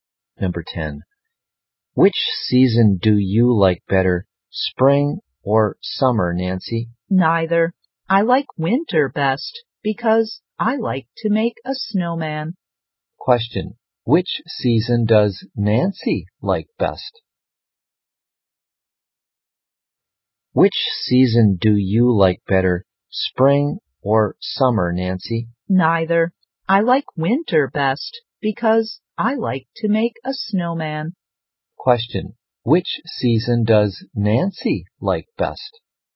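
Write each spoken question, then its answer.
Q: which season does Nancy like best?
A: Winter.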